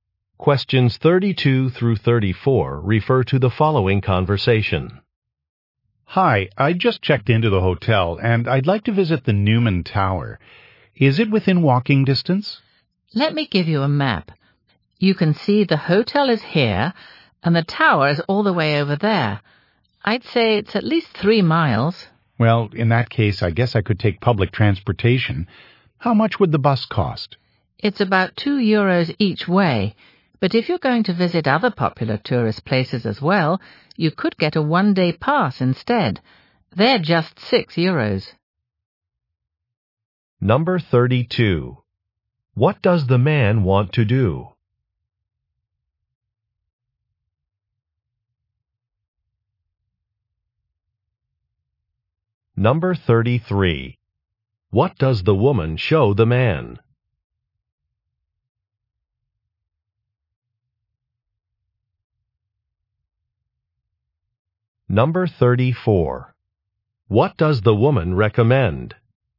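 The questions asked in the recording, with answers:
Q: What does the man want to do?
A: Visit the Newman Tower

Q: What does the woman show the man?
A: A map

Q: What does the woman recommend?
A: Getting a one-day bus pass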